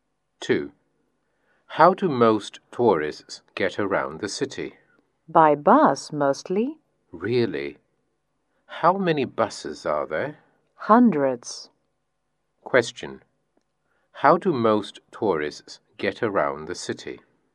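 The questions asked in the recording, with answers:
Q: How do most tourists get around the city?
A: By bus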